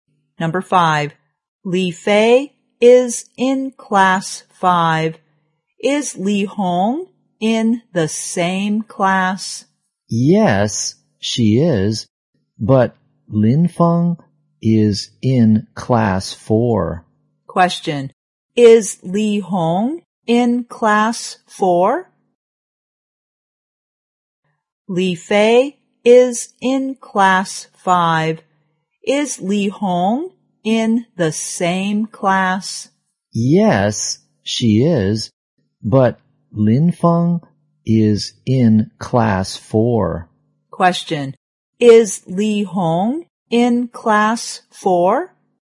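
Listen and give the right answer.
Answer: No, she is in class five.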